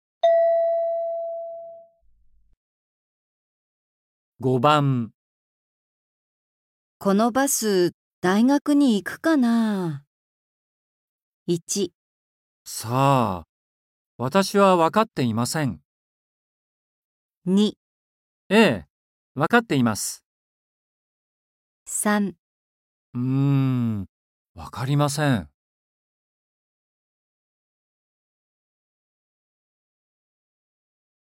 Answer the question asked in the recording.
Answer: 3

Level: N4.42